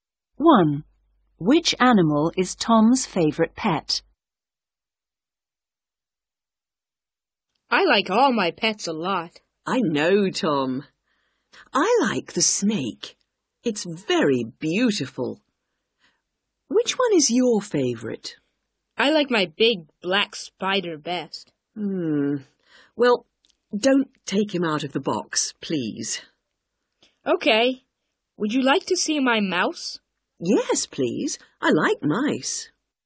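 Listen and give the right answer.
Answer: his big black spider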